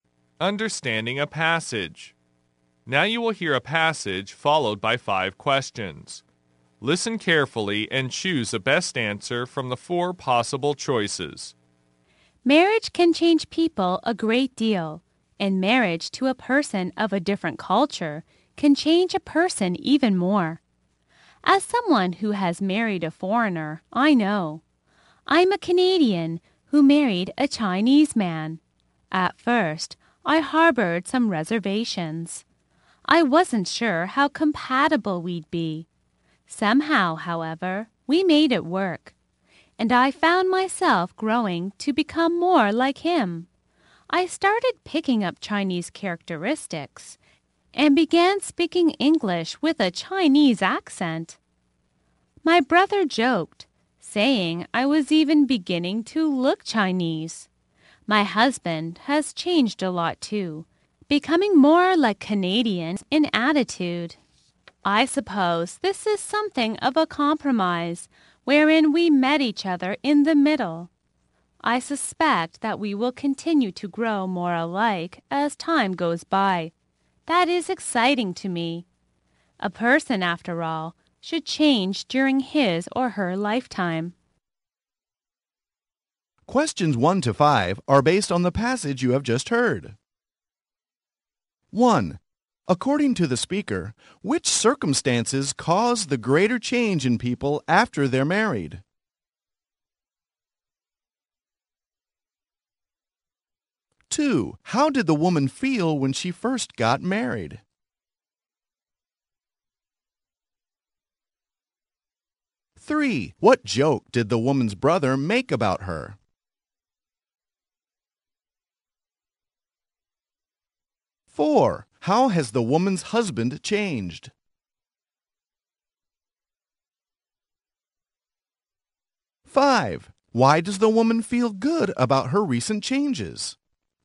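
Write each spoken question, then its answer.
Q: According to the speaker, which circumstances cause the greater change in people after they're married?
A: Marriage to a person of a different culture

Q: how did the woman feel when she first got married?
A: She had reservations, unsure how compatible they'd be

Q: what joke did the woman's brother make about her?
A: She was beginning to look Chinese

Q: how has the woman's husband changed?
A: He became more like Canadians in attitude

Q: why does the woman feel good about her recent changes?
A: A person should change during his or her lifetime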